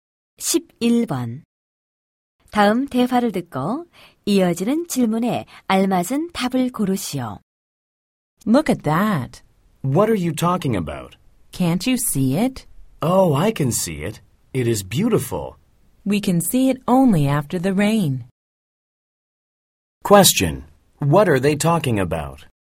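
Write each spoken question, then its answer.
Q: Question. What are they talking about?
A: A rainbow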